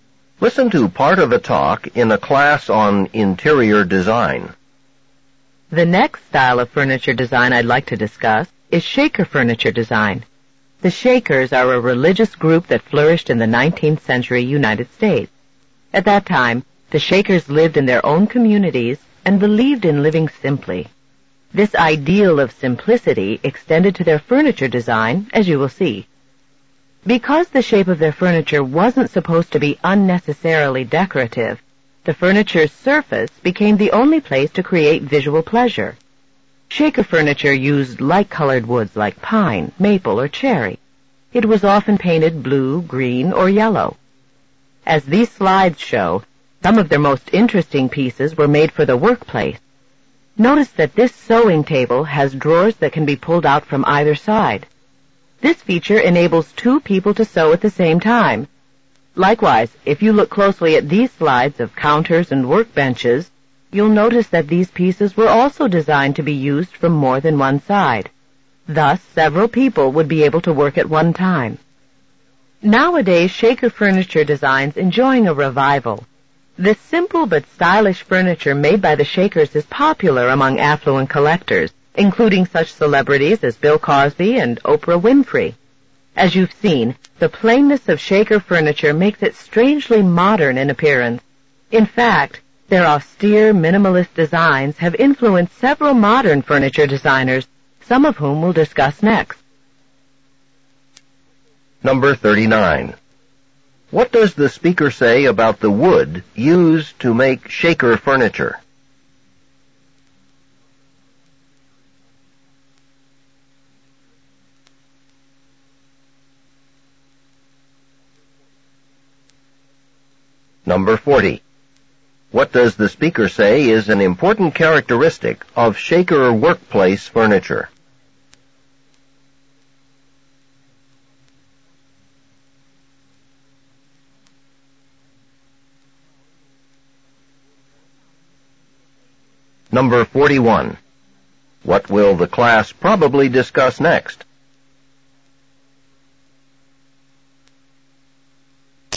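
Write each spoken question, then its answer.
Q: What does the speaker say about the wood used to make Shaker furniture?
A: It was light-colored wood like pine, maple, or cherry, often painted blue, green, or yellow

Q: What does the speaker say is an important characteristic of Shaker workplace furniture?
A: It could be used from more than one side, so several people could work at once

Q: What will the class probably discuss next?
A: Modern furniture designers influenced by Shaker design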